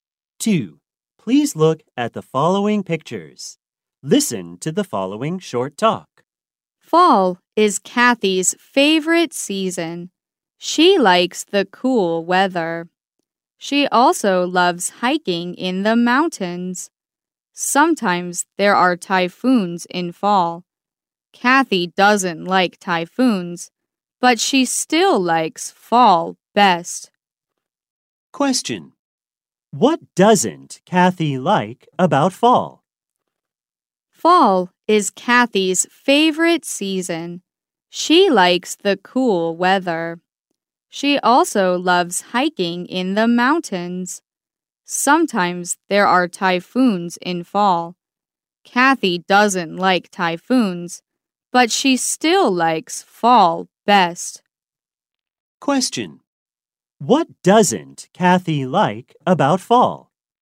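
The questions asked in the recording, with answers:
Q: What doesn't Kathy like about fall?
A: Typhoons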